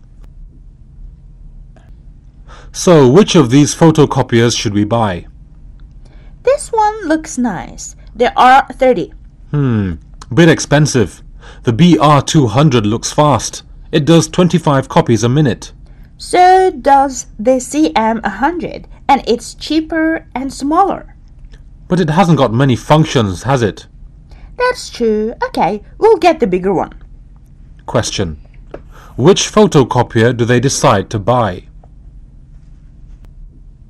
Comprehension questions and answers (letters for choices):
For questions 1-8 you will hear eight short recordings. · For each question mark one letter (A, B or C) for the correct answer.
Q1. Which photocopier do they decide to buy?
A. The BR 200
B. The CM 100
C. The R 30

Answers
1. A

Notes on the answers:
A: SO which of thee photocopiers should we buy? B: This one looks nice, the R30. A: Hmm. Bit expensive. The BR 200 looks fast. It does 25 copies a minute. B: So does the CM 100. And it's cheaper and smaller. A: But it hasn't got many functions, has it? B: That's true. OK, we'll get the bigger one.